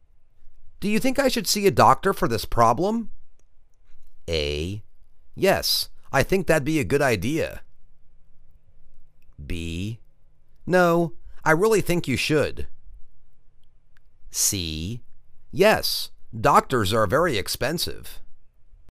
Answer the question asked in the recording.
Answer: Yes, I think that'd be a good idea.